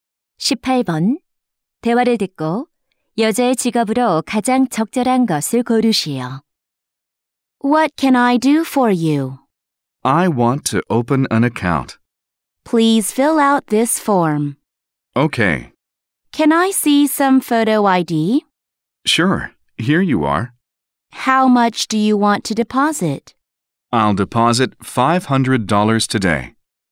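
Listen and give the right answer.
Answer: 은행원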